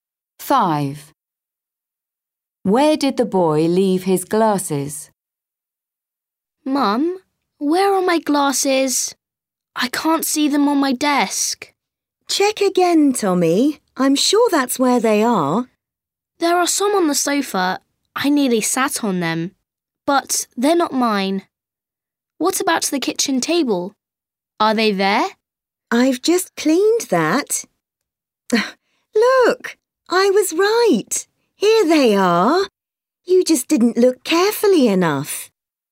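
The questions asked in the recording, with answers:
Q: Where did the boy leave his glasses?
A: on his desk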